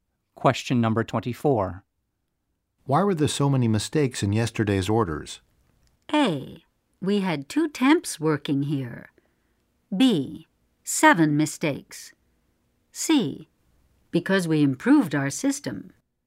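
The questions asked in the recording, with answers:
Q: Why were there so many mistakes in yesterday's orders?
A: A: We had 2 temps working here.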